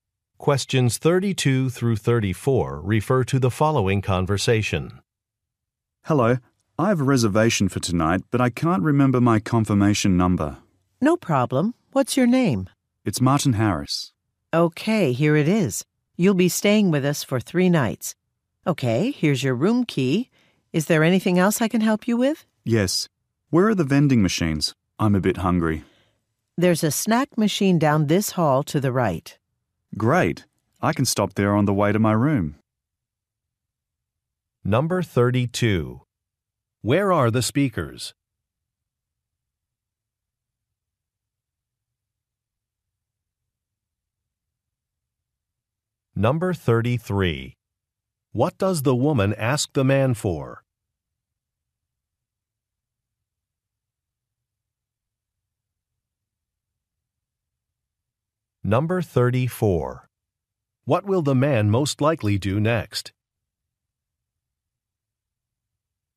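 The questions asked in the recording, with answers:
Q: Where are the speakers?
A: At a hotel

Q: What will the man most likely do next?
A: Go to the snack machine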